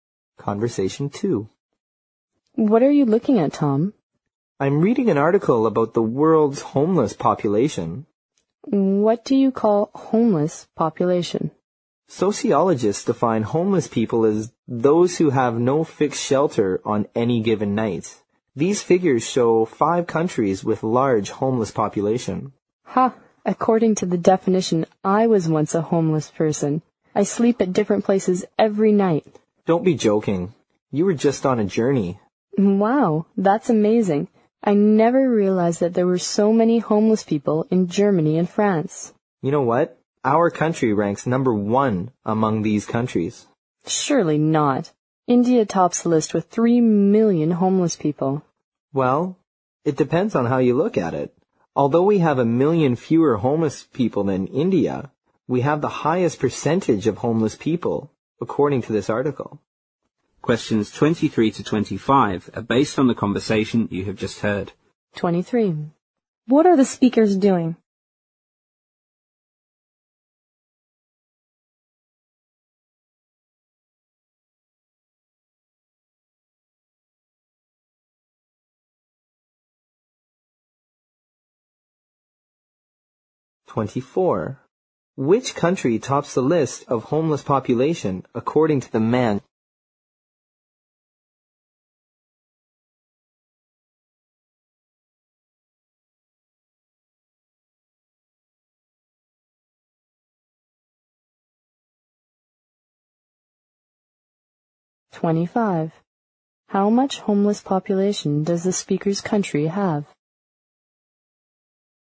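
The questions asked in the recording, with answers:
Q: What are the speakers doing?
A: Reading and discussing an article about the world's homeless population

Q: How much homeless population does the speaker's country have?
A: 2 million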